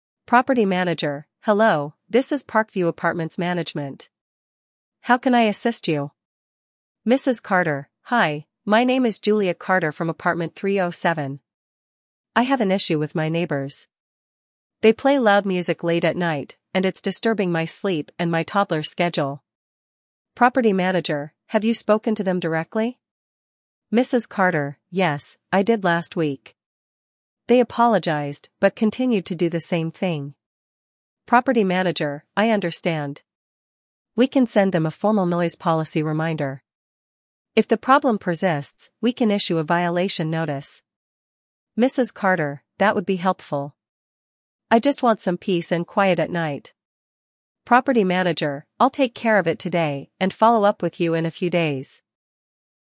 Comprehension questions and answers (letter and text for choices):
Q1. Why did Mrs. Carter call the property manager?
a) To request maintenance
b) To discuss a noisy neighbor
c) To report a theft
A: b) To discuss a noisy neighbor

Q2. What did Mrs. Carter do before calling the manager?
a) Called the police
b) Spoke to her neighbors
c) Filed a complaint online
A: b) Spoke to her neighbors

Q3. What solution does the property manager suggest first?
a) A warning letter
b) A formal noise policy reminder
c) An eviction notice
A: b) A formal noise policy reminder

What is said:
Property Manager: Hello, this is Parkview Apartments Management. How can I assist you?
Mrs. Carter: Hi, my name is Julia Carter from Apartment 307. I have an issue with my neighbors. They play loud music late at night, and it's disturbing my sleep and my toddler's schedule.
Property Manager: Have you spoken to them directly?
Mrs. Carter: Yes, I did last week. They apologized but continued to do the same thing.
Property Manager: I understand. We can send them a formal noise policy reminder. If the problem persists, we can issue a violation notice.
Mrs. Carter: That would be helpful. I just want some peace and quiet at night.
Property Manager: I'll take care of it today and follow up with you in a few days.